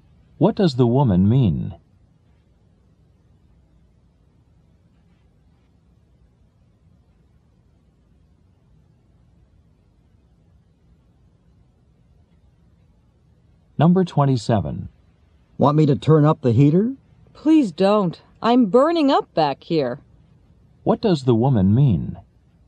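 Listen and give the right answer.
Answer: She is already too hot, so the heater shouldn't be turned up.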